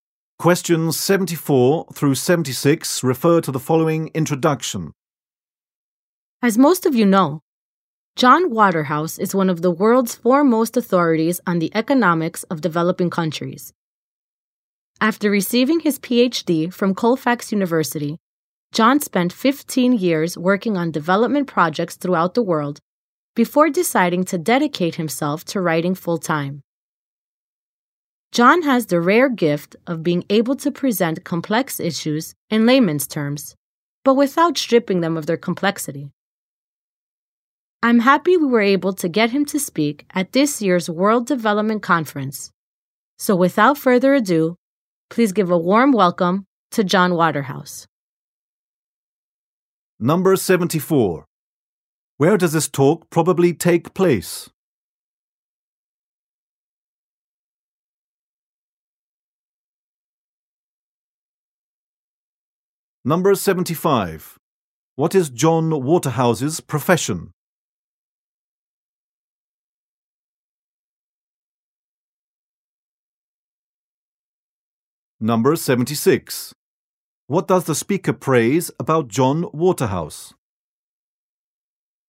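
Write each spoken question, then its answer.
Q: Where does this talk probably take place?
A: At the World Development Conference

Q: What is John Waterhouse's profession?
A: Writer

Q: What does the speaker praise about John Waterhouse?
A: He explains complex issues in simple terms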